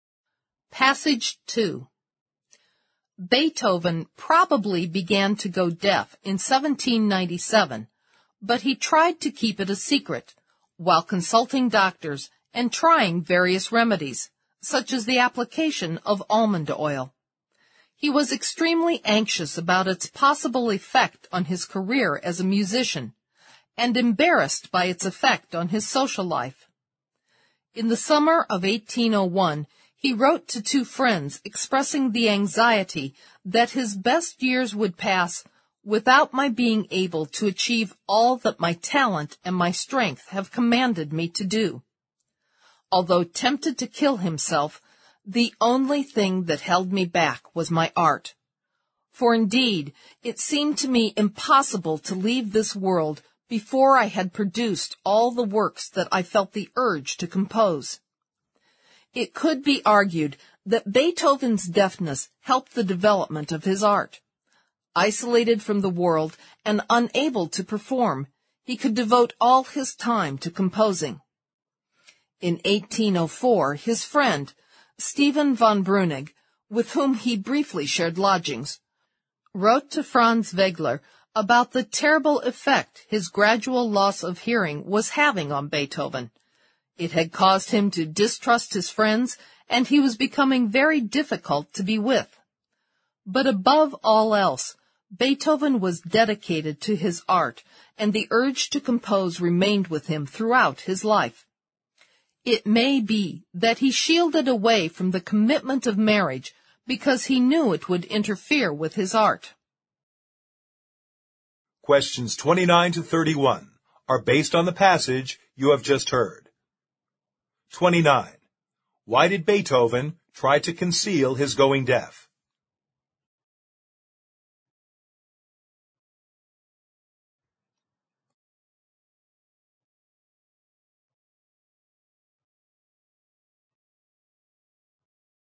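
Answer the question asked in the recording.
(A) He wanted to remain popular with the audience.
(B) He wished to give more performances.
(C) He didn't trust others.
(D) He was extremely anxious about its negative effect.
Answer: (D) He was extremely anxious about its negative effect.

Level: 四级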